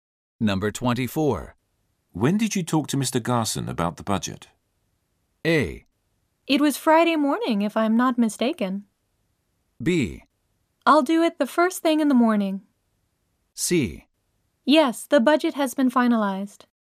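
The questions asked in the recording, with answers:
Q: When did you talk to Mr. Garson about the budget?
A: A: It was Friday morning, if I'm not mistaken.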